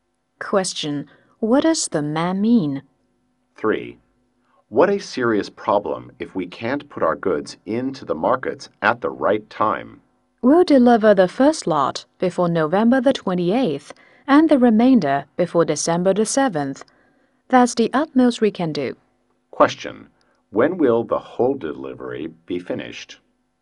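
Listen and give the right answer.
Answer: Before December 7th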